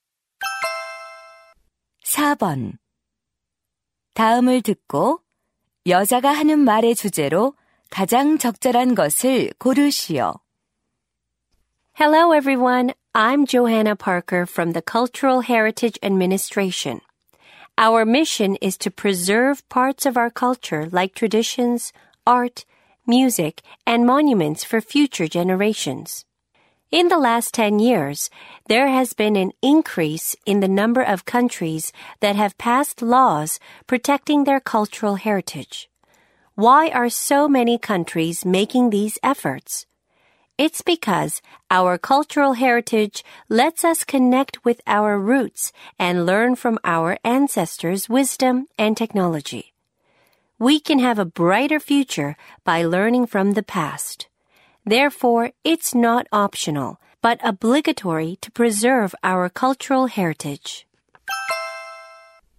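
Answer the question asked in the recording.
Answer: 문화유산 보존의 필요성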